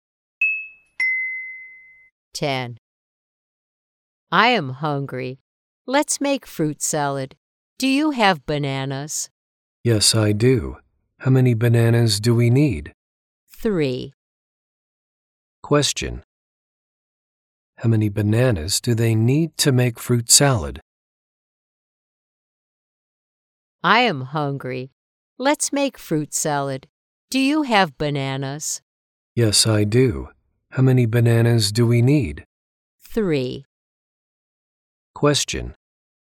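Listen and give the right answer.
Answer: Three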